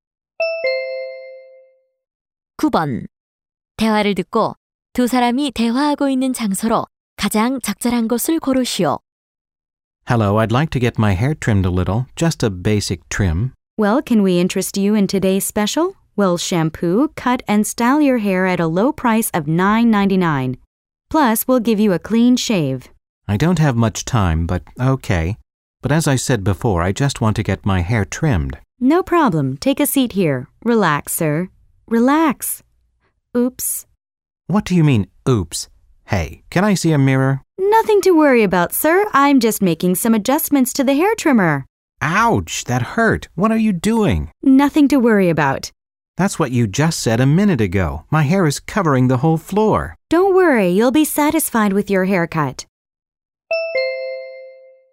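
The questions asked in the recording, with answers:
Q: 대화를 듣고 두 사람이 대화하고 있는 장소로 가장 적절한 곳을 고르시오.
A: 이발소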